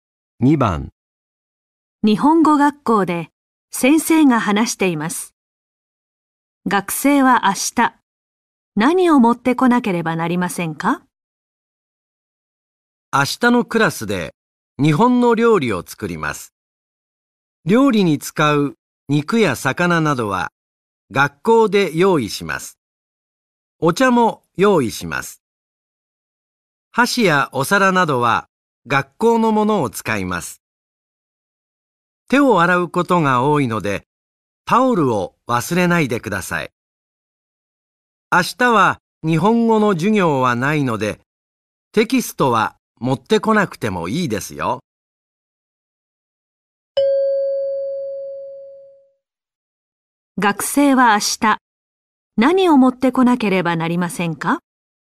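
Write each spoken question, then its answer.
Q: 学生は明日、何を持ってこなければなりませんか?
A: タオル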